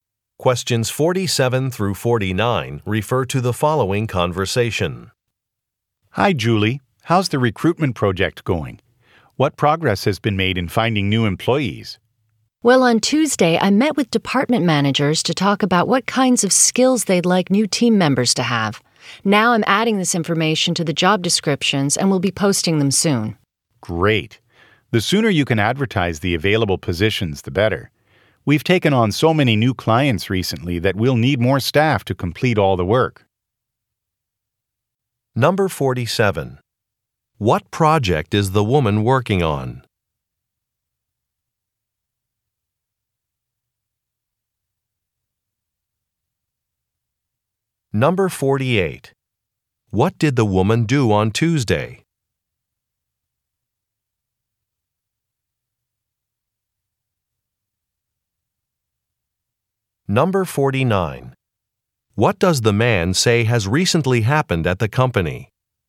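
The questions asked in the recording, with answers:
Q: What project is the woman working on?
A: Recruiting new employees

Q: What did the woman do on Tuesday?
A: Met with department managers

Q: What does the man say has recently happened at the company?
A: It has taken on many new clients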